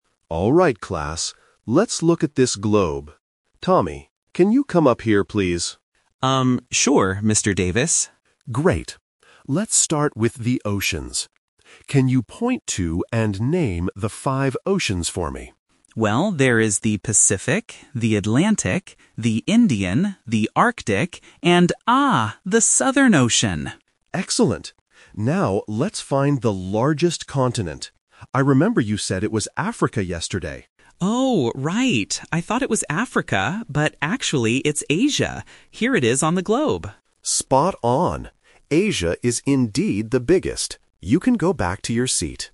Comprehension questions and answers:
Listen to the conversation between a geography teacher and his student. Choose the correct answer (A, B, or C) for each question.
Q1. What does the teacher ask Tommy to name first?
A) The five oceans.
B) The largest continent.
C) Five different countries.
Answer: A) The five oceans.

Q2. What continent did Tommy think was the largest yesterday?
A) Asia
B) Africa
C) Europe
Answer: B) Africa

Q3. Which continent does Tommy point to at the end of the conversation?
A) Africa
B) Asia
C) Australia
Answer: B) Asia

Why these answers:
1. Why B is a trap: The largest continent is what the teacher asks Tommy to find second, not first. Why C is wrong: Countries are not mentioned in this conversation at all.
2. Why B is correct: The teacher reminds him: "I remember you said it was Africa yesterday," and Tommy agrees ("I thought it was Africa..."). Why A is a trap: Asia is the actual largest continent, but it is not what Tommy thought yesterday. This uses the classic A2 past vs. present distractor. Why C is wrong: Europe is a plausible continent but is never mentioned in the audio.
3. Why B is correct: Tommy corrects his previous mistake by saying, "but actually, it's Asia. Here it is on the globe." Why A is a trap: Africa was mentioned, but it was his incorrect answer from the day before, so he rejects it. Why C is wrong: Australia is not mentioned in the dialogue.

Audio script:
Let's look at this globe. Tommy, can you come up here, please?
Student: Um, sure, Mr. Davis.
Teacher: Great. Let's start with the oceans. Can you point to and name the five oceans for me?
Student: Well, there is the Pacific, the Atlantic, the Indian, the Arctic, and... ah, the Southern Ocean!
Teacher: Excellent! Now, let's find the largest continent. I remember you said it was Africa yesterday.
Student: Oh, right. I thought it was Africa, but actually, it's Asia. Here it is on the globe.
Teacher: Spot on! Asia is indeed the biggest. You can go back to your seat.

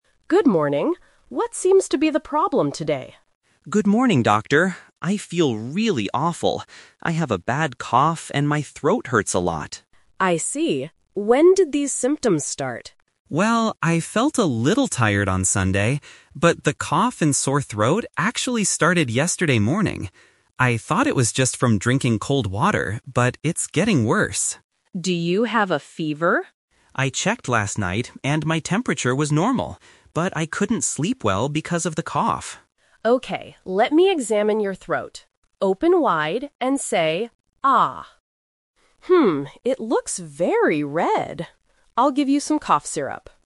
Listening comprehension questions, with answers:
Listen to the conversation between a doctor and a patient. Choose the correct answer (A, B, or C) for each question.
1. What are the patient's main health problems?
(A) A cough and a sore throat.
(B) A high fever and a cough.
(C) A stomachache and a sore throat.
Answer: (A) A cough and a sore throat.

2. When did the cough and sore throat begin?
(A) On Sunday.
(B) Yesterday morning.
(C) Last night.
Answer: (B) Yesterday morning.

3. What is the doctor going to give the patient?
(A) A glass of cold water.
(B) Some sleeping pills.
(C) Some cough syrup.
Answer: (C) Some cough syrup.

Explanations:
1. The patient clearly states, "I have a bad cough and my throat hurts a lot" (throat hurts = sore throat). Trap B is wrong: The doctor asks about a fever, but the patient says "my temperature was normal." (No fever). Trap C is wrong: A stomachache is a plausible illness, but it is not mentioned in the audio.
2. The patient explicitly says, "the cough and sore throat actually started yesterday morning." Trap A is wrong (The Trap): The patient says "I felt a little tired on Sunday", but the specific symptoms (cough/sore throat) didn't start then. Trap C is wrong: "Last night" is when the patient checked for a fever and couldn't sleep well, not when the symptoms started.
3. At the end of the conversation, the doctor says, "I'll give you some cough syrup." Trap A is wrong: The patient mentions "drinking cold water" as the reason he thought he got sick, not what the doctor gives him. Trap B is wrong: The patient says he couldn't sleep well, making "sleeping pills" a very logical trap, but the doctor does not offer them.

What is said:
Doctor: Good morning. What seems to be the problem today?
Patient: Good morning, Doctor. I feel really awful. I have a bad cough and my throat hurts a lot.
Doctor: I see. When did these symptoms start?
Patient: Well, I felt a little tired on Sunday. But the cough and sore throat actually started yesterday morning. I thought it was just from drinking cold water, but it's getting worse.
Doctor: Do you have a fever?
Patient: I checked last night, and my temperature was normal. But I couldn't sleep well because of the cough.
Doctor: Okay, let me examine your throat. Open wide and say 'ah'. Hmm, it looks very red. I'll give you some cough syrup.

